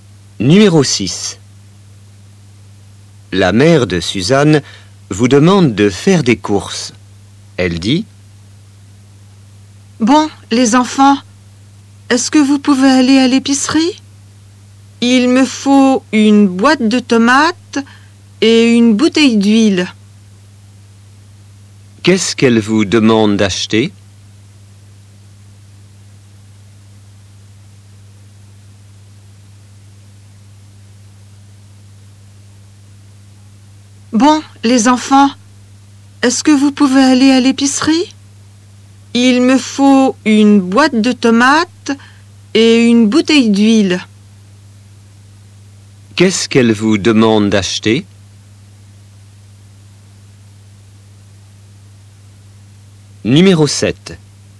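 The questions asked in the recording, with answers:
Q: Qu'est-ce qu'elle vous demande d'acheter?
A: une boîte de tomates et une bouteille d'huile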